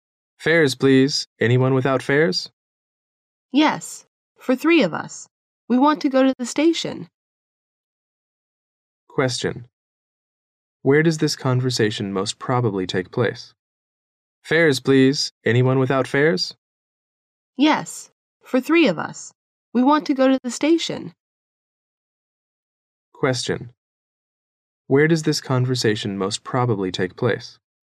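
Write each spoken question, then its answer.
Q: Where does this conversation most probably take place?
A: On a bus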